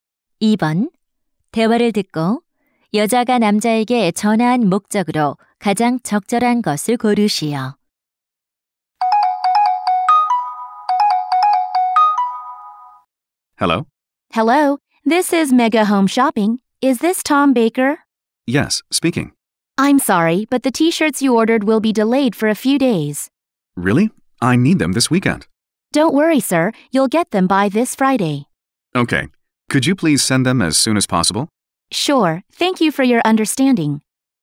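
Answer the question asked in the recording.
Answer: 주문한 티셔츠 배송이 며칠 지연된다고 알리기 위해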